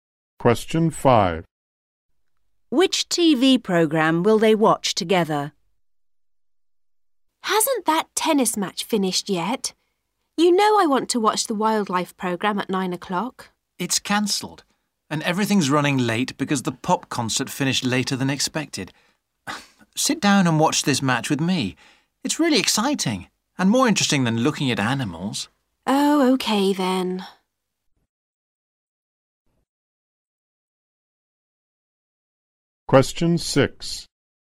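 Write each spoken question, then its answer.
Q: Which TV program will they watch together?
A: The tennis match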